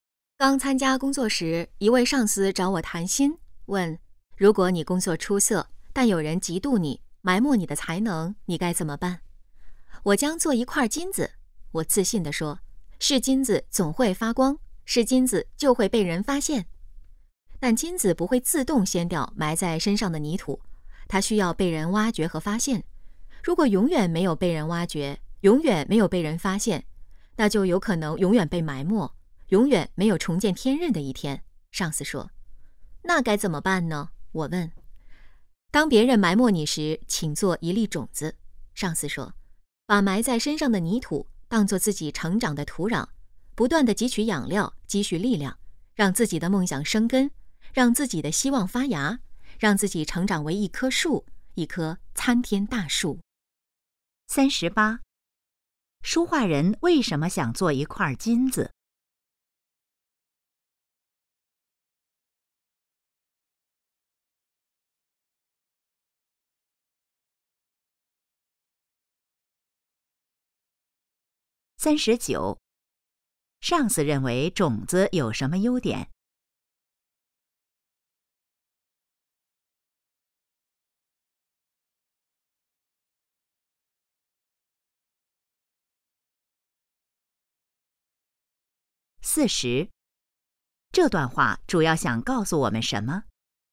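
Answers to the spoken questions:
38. 是金子总会发光,总会被人发现
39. 能把埋在身上的泥土当作成长的土壤,自己成长
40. 被人埋没时要像种子一样主动成长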